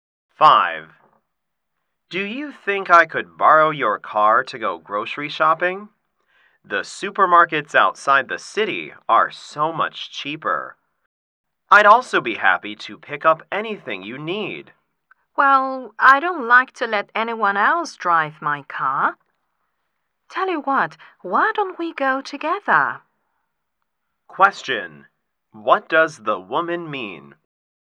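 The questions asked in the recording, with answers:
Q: What does the woman mean?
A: She won't lend her car, but they can go shopping together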